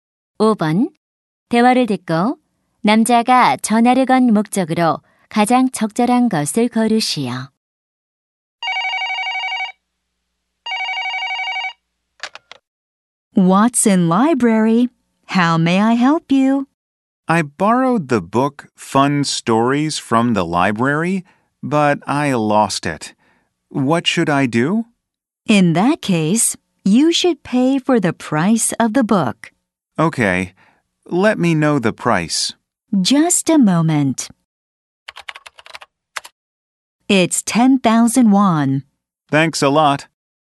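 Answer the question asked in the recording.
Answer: 잃어버린 책에 대해 문의하려고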